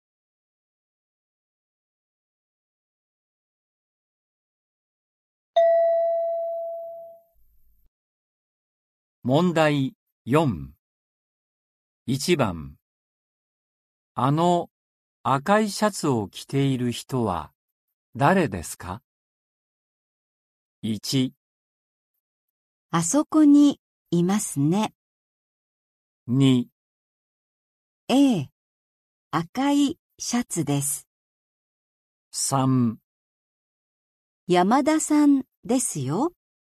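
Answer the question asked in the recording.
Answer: 3: 山田さんですよ。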